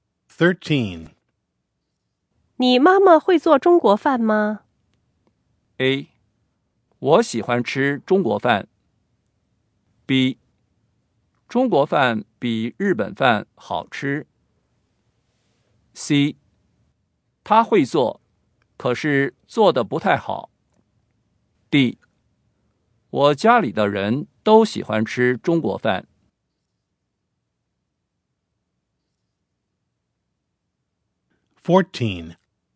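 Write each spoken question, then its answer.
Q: 你妈妈会做中国饭吗?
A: C: 她会做,可是做得不太好。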